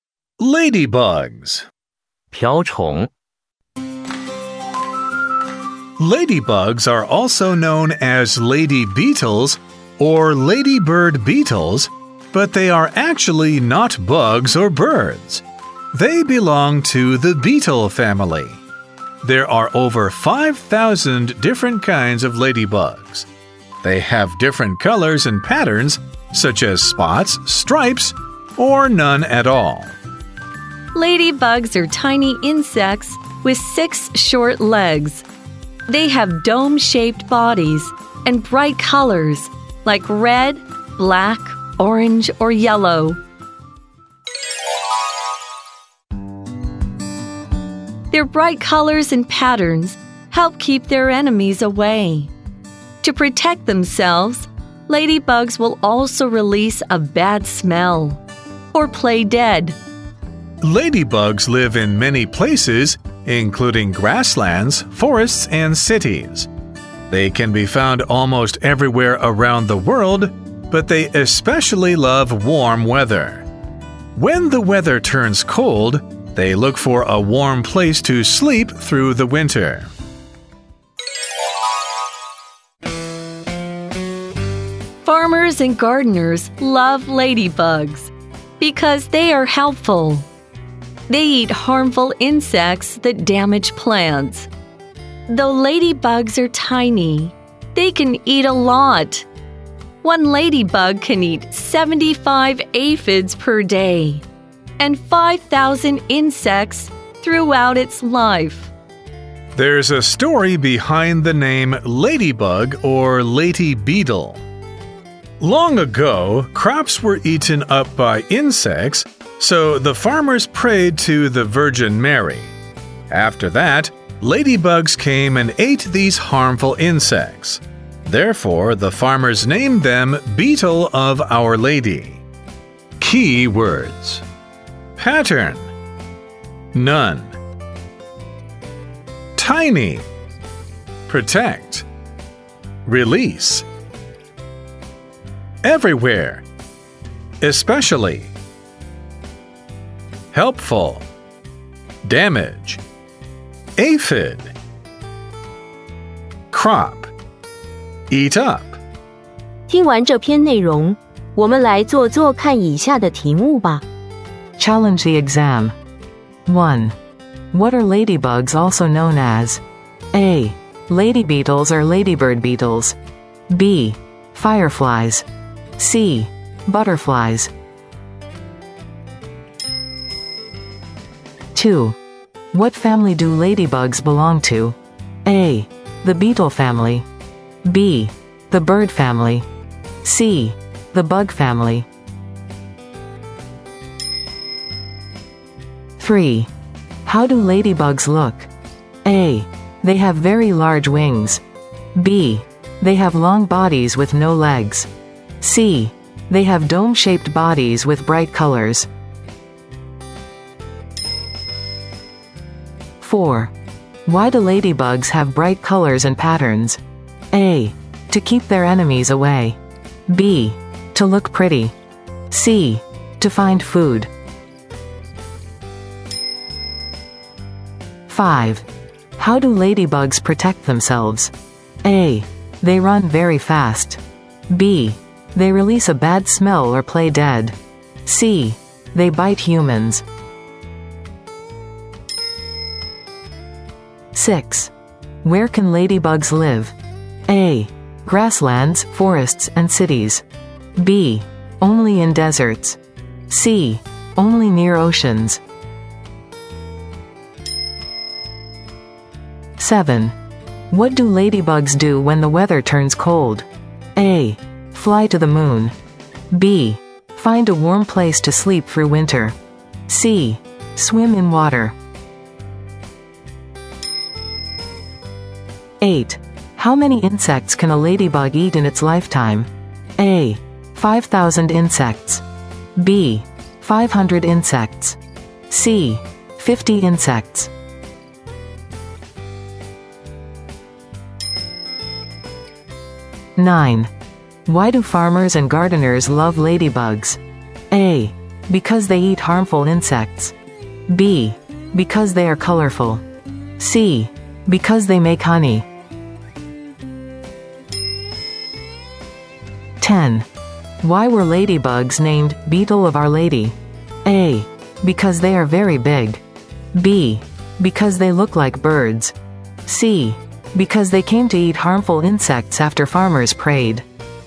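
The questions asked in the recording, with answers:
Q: What are ladybugs also known as?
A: A: Lady beetles or ladybird beetles.

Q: What family do ladybugs belong to?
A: A: The beetle family.

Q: How do ladybugs look?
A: C: They have dome-shaped bodies with bright colors.

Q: Why do ladybugs have bright colors and patterns?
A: A: To keep their enemies away.

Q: How do ladybugs protect themselves?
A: B: They release a bad smell or play dead.

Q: Where can ladybugs live?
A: A: Grasslands, forests, and cities.

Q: What do ladybugs do when the weather turns cold?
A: B: Find a warm place to sleep through winter.

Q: How many insects can a ladybug eat in its lifetime?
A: A: 5,000 insects.

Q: Why do farmers and gardeners love ladybugs?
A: A: Because they eat harmful insects.

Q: Why were ladybugs named Beetle of Our Lady?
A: C: Because they came to eat harmful insects after farmers prayed.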